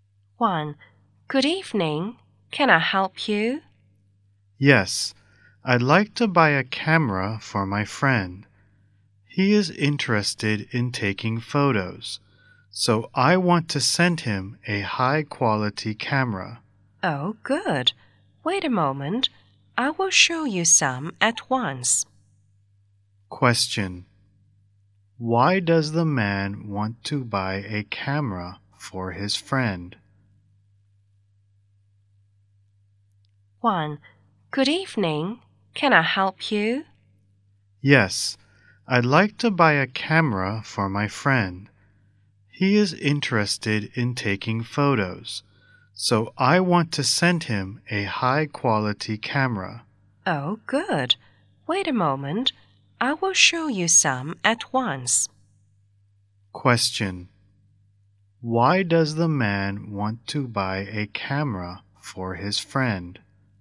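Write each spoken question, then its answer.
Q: Why does the man want to buy a camera for his friend?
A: Because his friend is interested in taking photos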